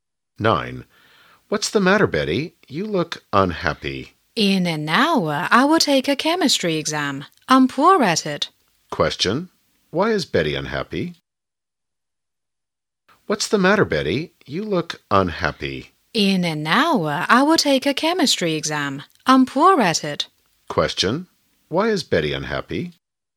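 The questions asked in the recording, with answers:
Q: Why is Betty unhappy?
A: She will take a chemistry exam, which she is poor at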